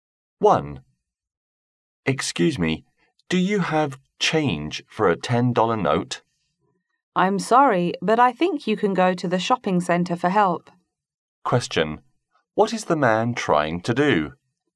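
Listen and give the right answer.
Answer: Get change for a $10 note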